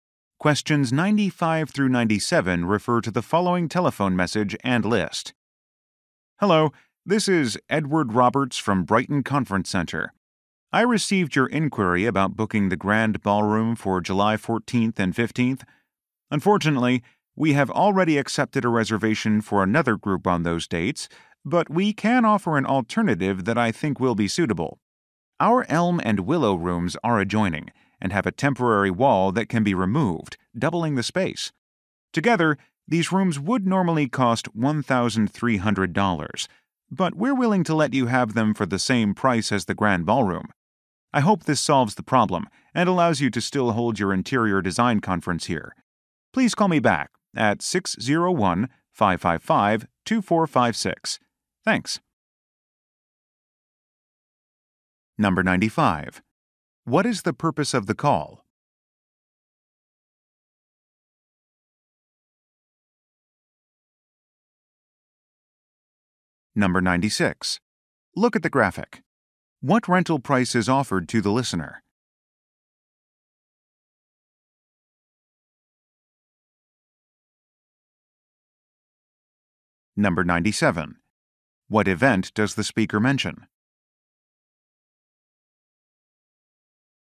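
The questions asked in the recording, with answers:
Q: What is the purpose of the call?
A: To offer other rooms because the ballroom is booked

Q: What event does the speaker mention?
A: An interior design conference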